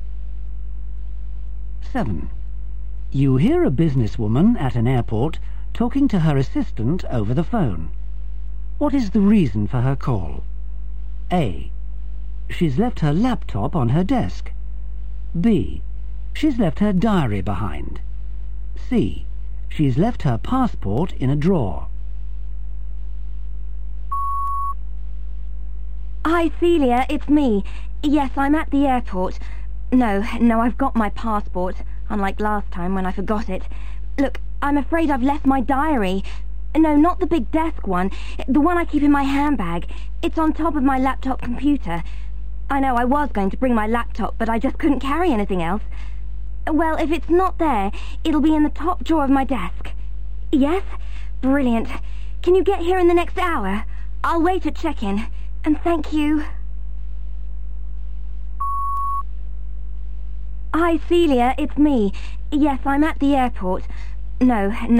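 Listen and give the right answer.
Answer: B: She's left her diary behind.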